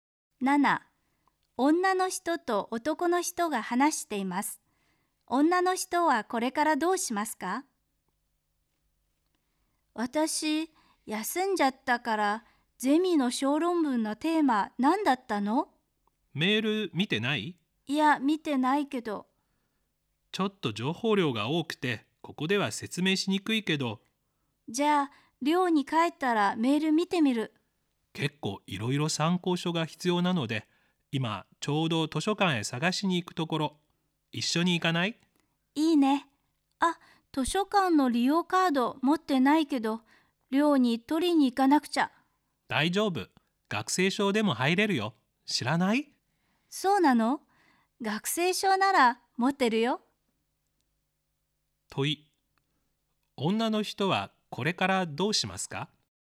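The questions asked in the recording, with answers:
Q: 問い、女の人はこれからどうしますか?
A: 学生証を持って男の人と図書館へ行く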